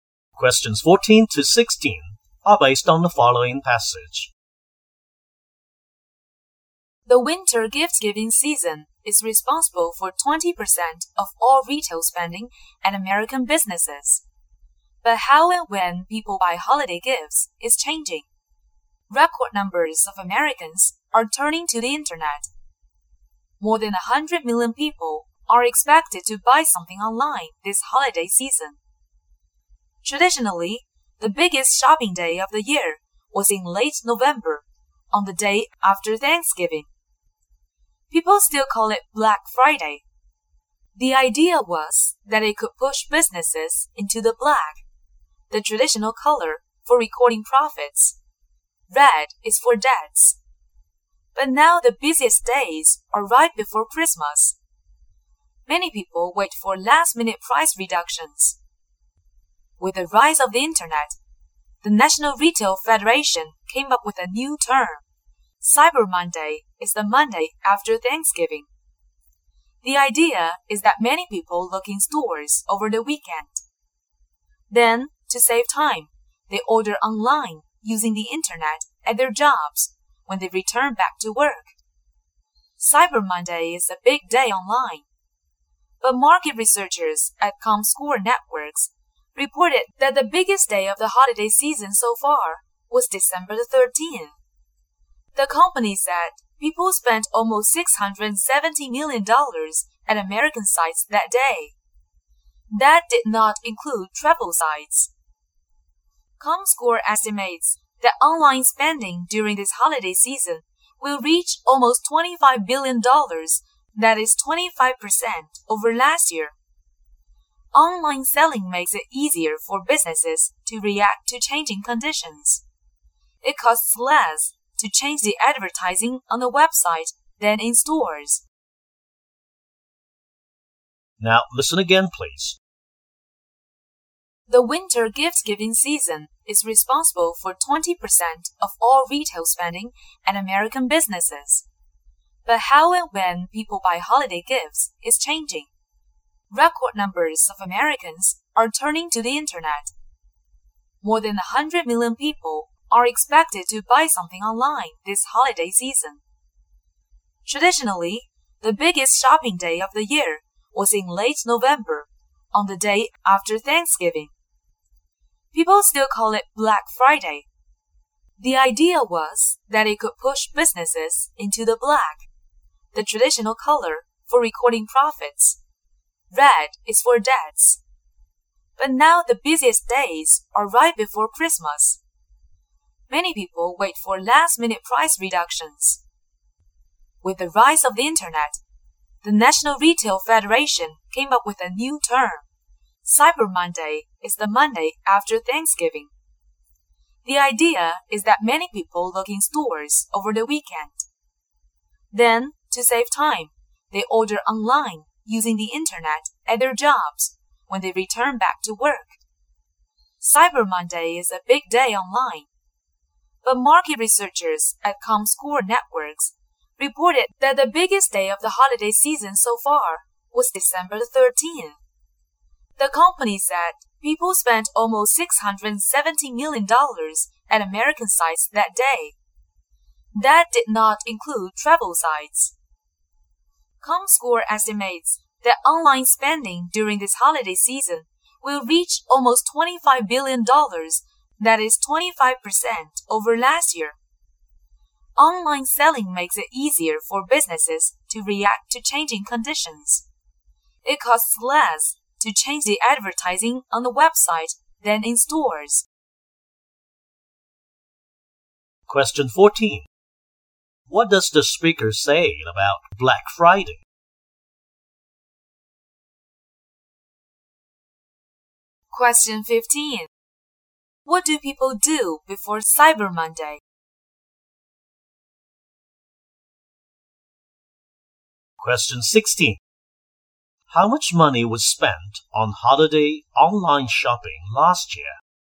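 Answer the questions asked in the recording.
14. It was traditionally the biggest shopping day, the day after Thanksgiving
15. They look around in stores over the weekend
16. About $20 billion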